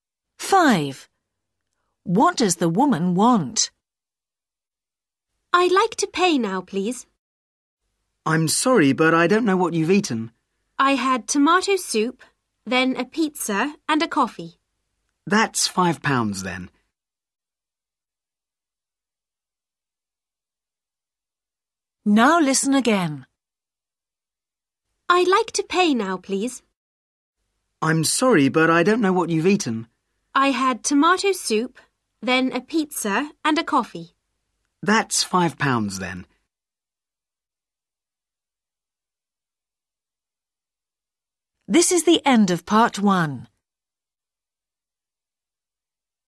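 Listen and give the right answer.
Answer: To pay the bill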